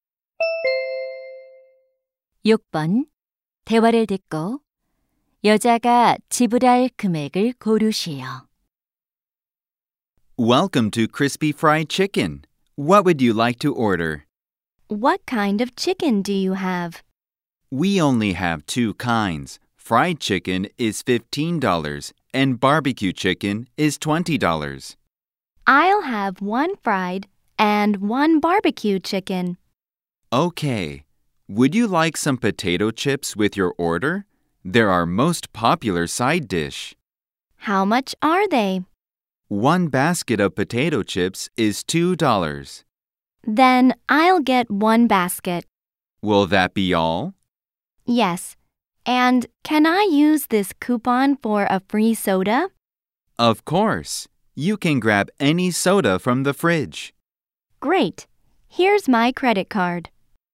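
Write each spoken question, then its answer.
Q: 대화를 듣고 여자가 지불할 금액을 고르시오.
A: 37달러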